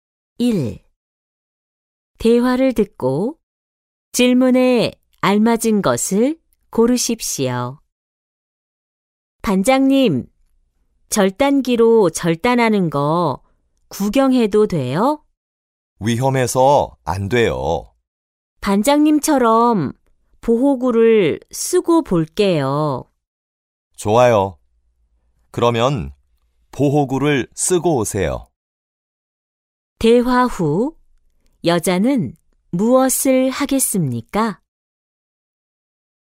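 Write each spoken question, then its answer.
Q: 대화 후 여자는 무엇을 하겠습니까?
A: 보호구를 쓰고 온다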